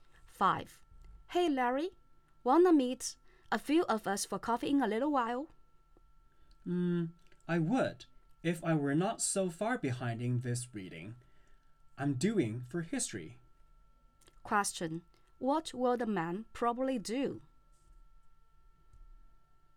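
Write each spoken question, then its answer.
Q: What will the man probably do?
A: Keep doing his history reading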